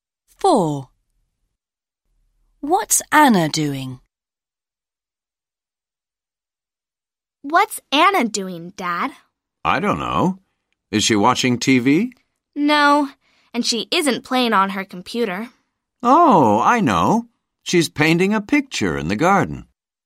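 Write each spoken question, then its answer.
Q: What's Anna doing?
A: painting a picture in the garden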